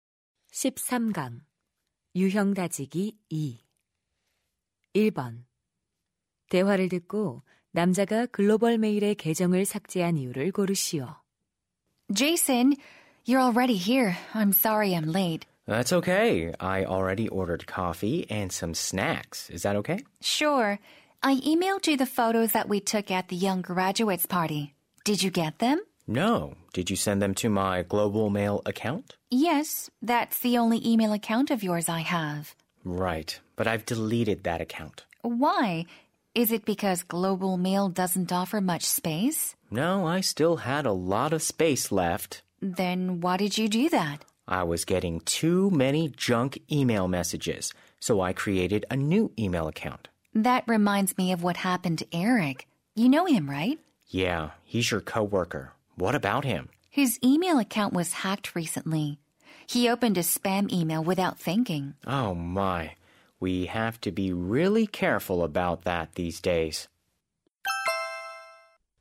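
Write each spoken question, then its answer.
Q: 대화를 듣고 남자가 글로벌 메일의 계정을 삭제한 이유를 고르시오.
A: 스팸(정크) 메일을 너무 많이 받아서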